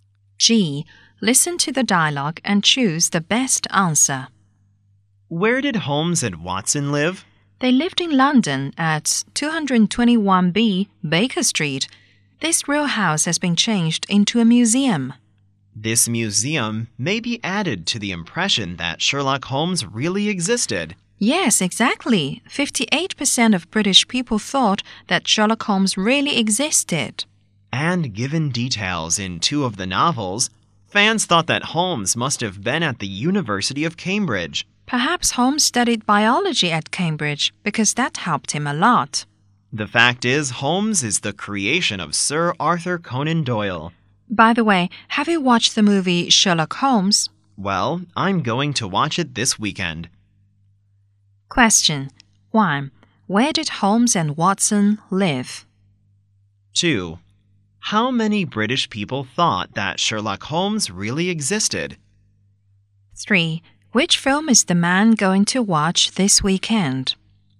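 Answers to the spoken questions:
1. At 221B Baker Street, London
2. 58%
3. Sherlock Holmes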